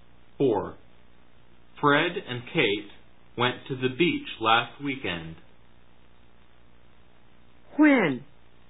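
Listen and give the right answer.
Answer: Last weekend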